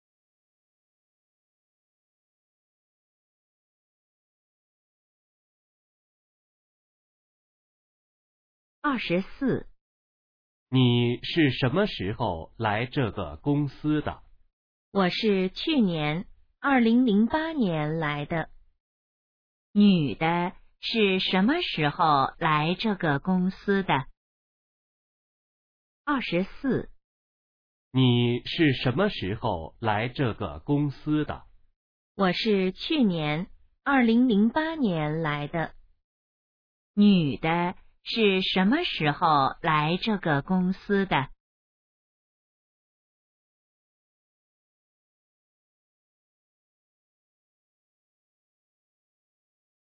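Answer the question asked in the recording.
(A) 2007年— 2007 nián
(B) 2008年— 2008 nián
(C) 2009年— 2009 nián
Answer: (B) 2008年— 2008 nián

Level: HSK2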